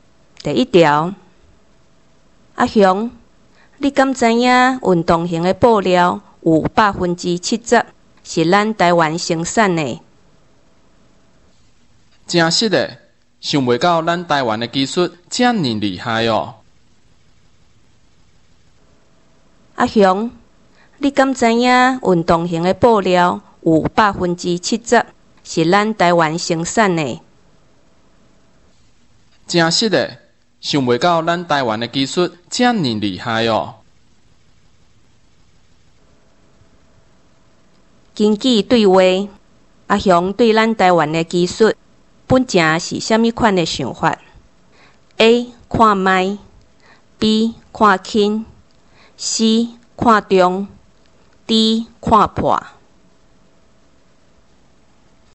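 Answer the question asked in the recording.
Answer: B: 看轻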